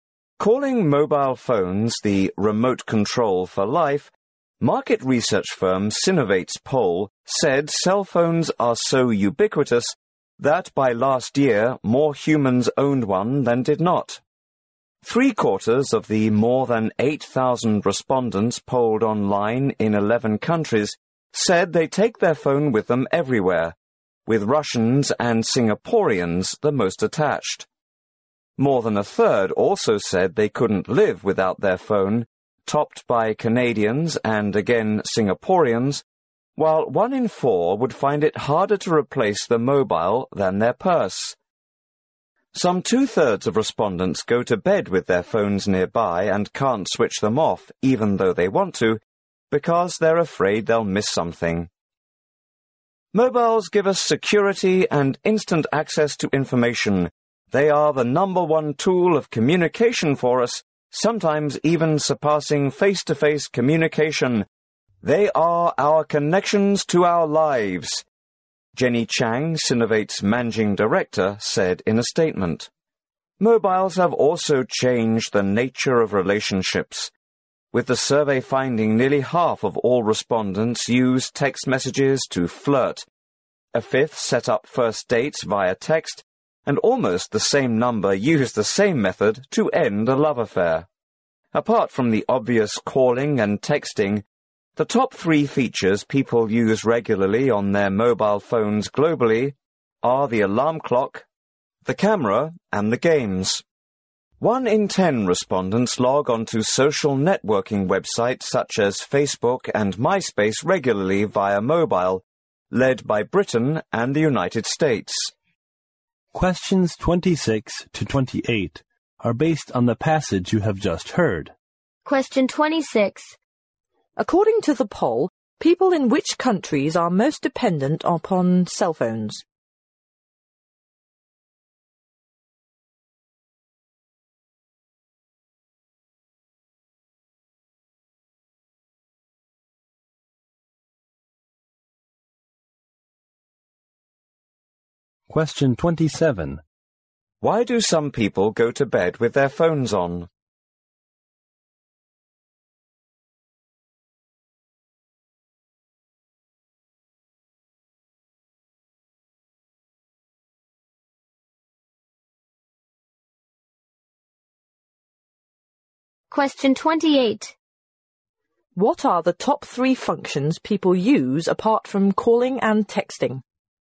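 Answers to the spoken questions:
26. Singapore (with Russia and Canada)
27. They are afraid they'll miss something
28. Alarm clock, camera and games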